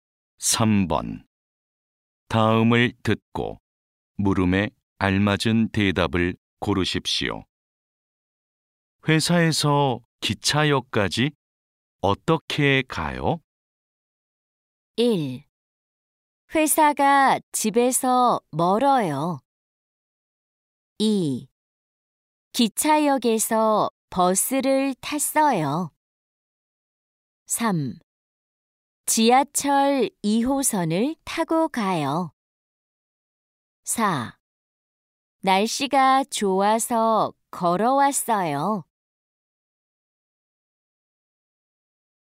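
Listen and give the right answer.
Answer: 3: 지하철 2호선을 타고 가요.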